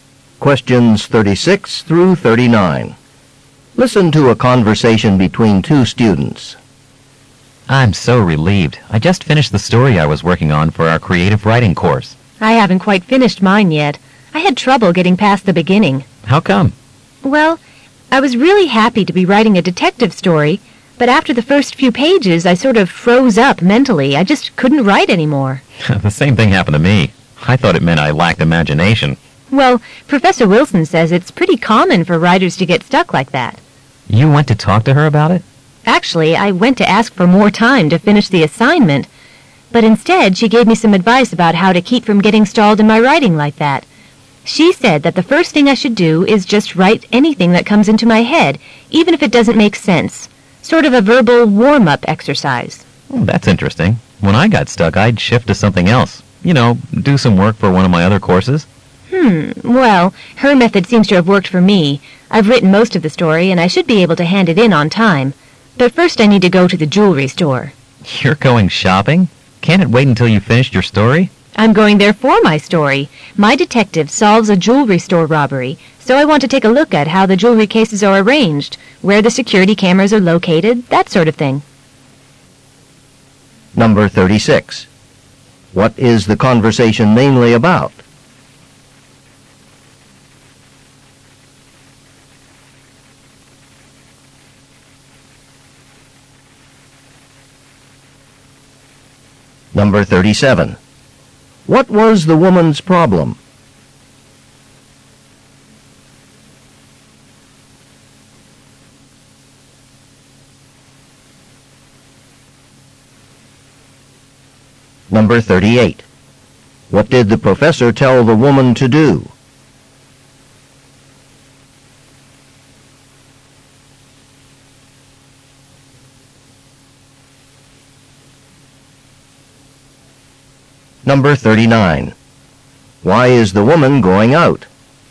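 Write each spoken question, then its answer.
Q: What is the conversation mainly about?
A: Getting stuck while writing a story

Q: What was the woman's problem?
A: She couldn't continue writing her story.

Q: What did the professor tell the woman to do?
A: Write whatever comes into her head.

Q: Why is the woman going out?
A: To research a jewelry store for her story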